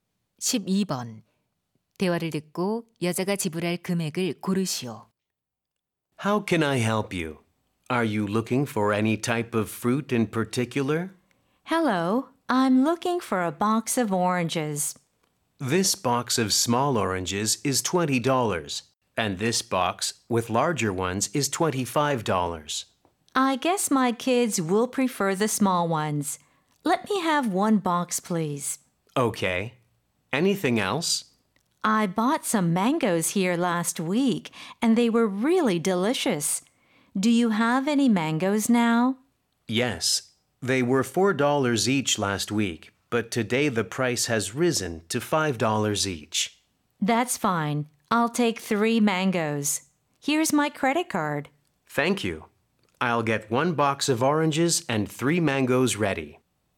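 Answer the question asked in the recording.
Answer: 35달러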